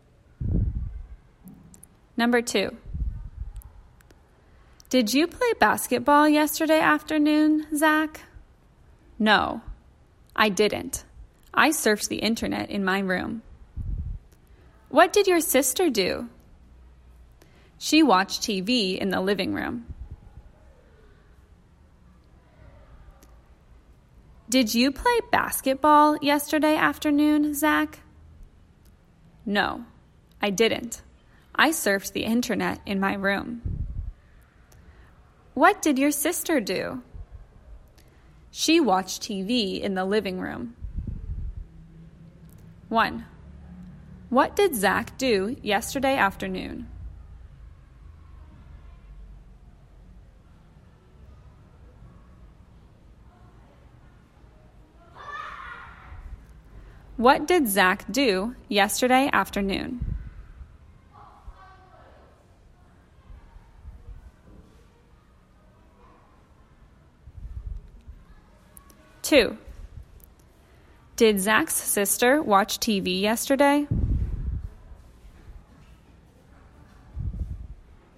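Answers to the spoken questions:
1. He surfed the internet in his room.
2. Yes, she did.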